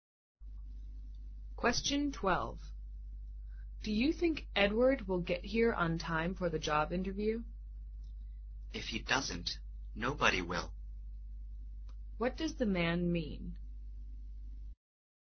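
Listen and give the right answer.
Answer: Edward is sure to be on time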